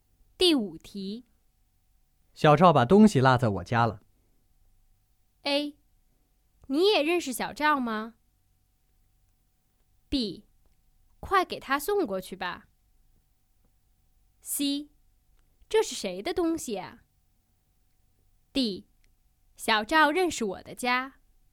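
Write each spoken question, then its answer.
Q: 小赵把东西落在我家了。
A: B: 快给他送过去吧。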